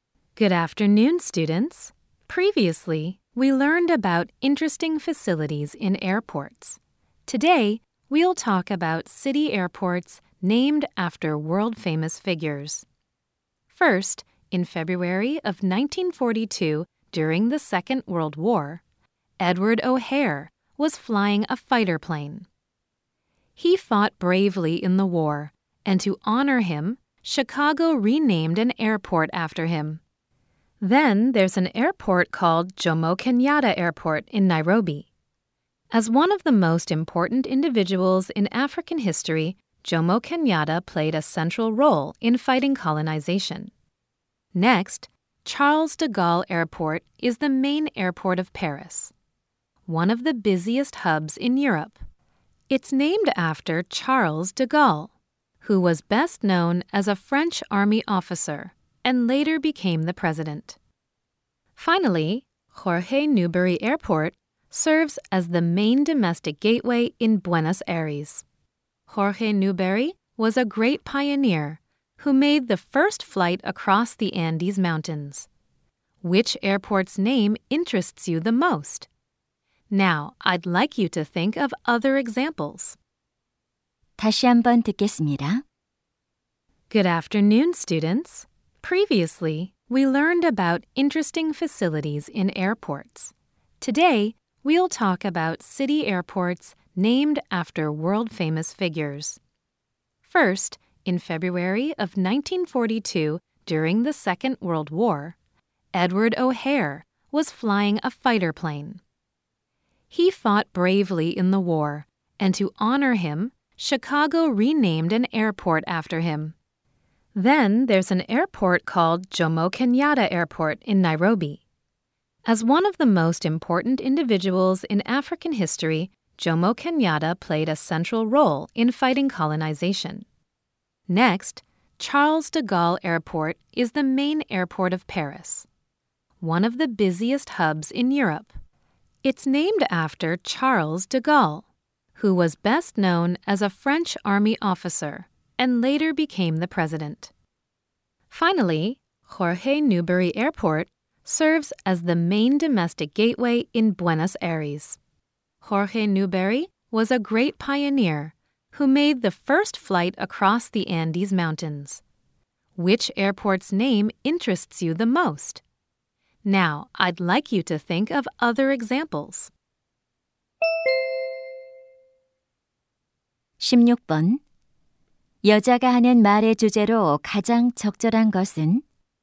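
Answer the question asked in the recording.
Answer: 세계적인 유명 인물의 이름을 딴 도시 공항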